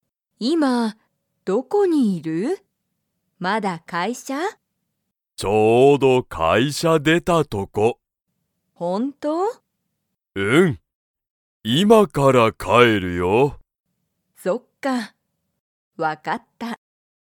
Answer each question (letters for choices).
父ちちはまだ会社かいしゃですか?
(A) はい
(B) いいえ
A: B

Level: Level 1